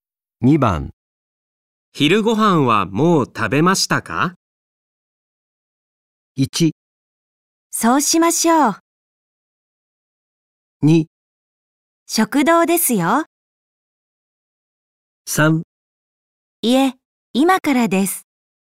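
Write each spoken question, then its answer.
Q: 昼ご飯はもう食べましたか?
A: 3: いえ、今からです。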